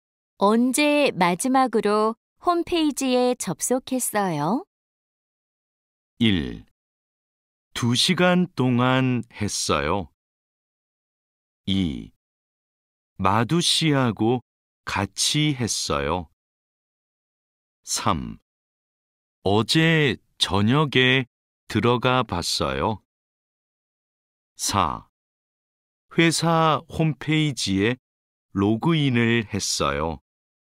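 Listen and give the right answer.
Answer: 3: 어제 저녁에 들어가 봤어요.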